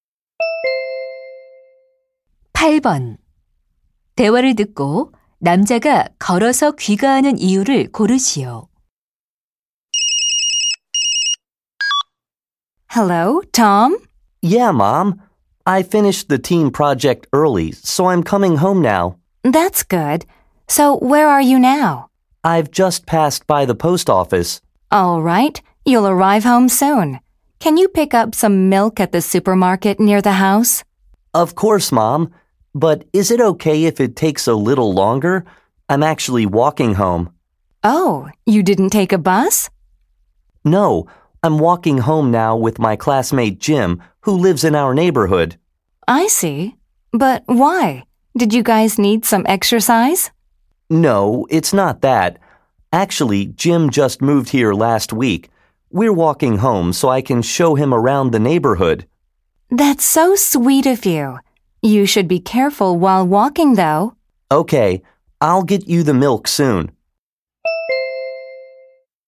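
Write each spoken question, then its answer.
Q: 대화를 듣고 남자가 걸어서 귀가하는 이유를 고르시오.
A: 이사 온 친구에게 동네를 구경시켜 주려고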